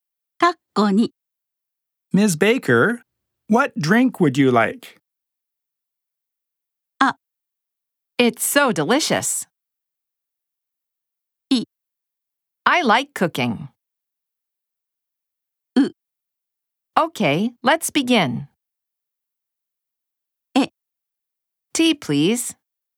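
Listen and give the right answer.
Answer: エ: Tea, please.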